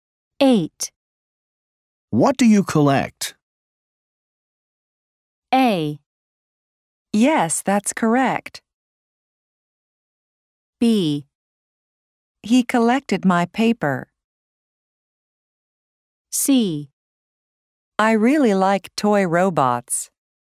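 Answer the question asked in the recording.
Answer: C: I really like toy robots.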